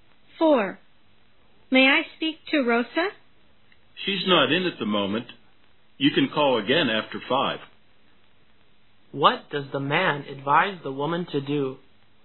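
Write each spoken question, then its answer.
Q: What does the man advise the woman to do?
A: Call again after 5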